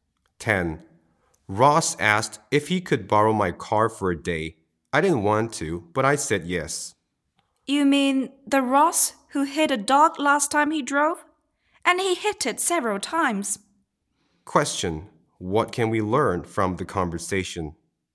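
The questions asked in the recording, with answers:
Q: What can we learn from the conversation?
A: Ross is a bad driver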